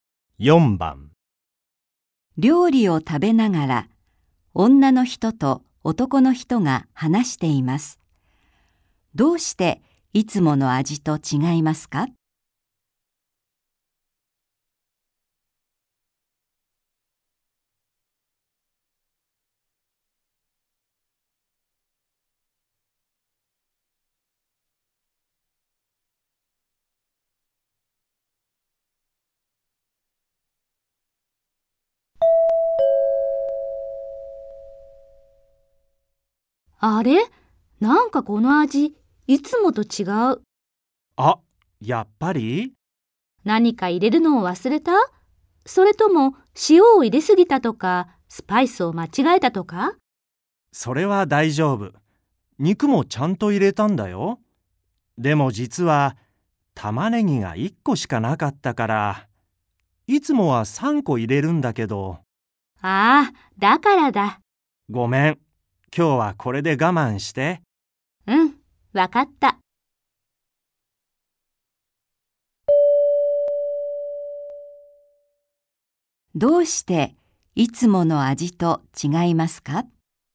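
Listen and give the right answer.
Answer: 玉ねぎが1個しか入っていないから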